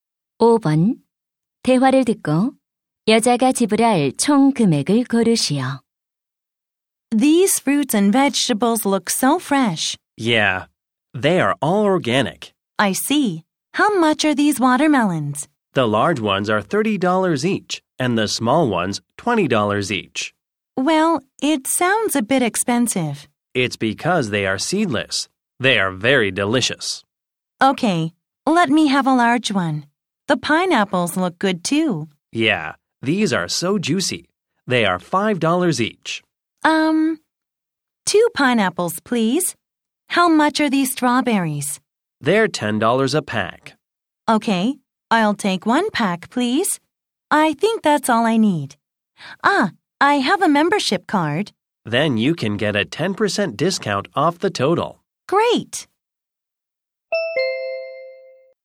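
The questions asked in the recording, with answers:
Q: 대화를 듣고 여자가 지불할 총 금액을 고르시오.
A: $45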